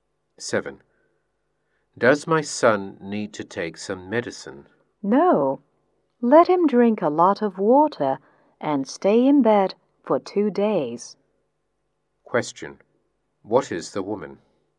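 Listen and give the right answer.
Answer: A doctor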